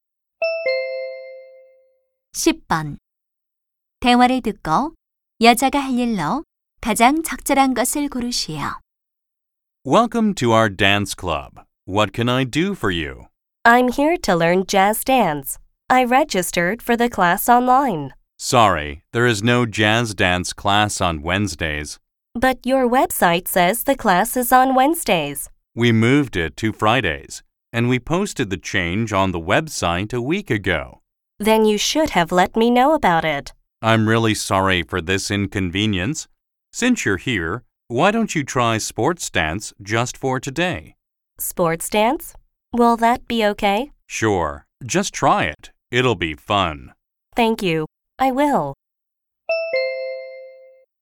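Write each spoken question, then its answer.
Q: 여자가 할 일로 가장 적절한 것을 고르시오.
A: 오늘 스포츠 댄스 수업 듣기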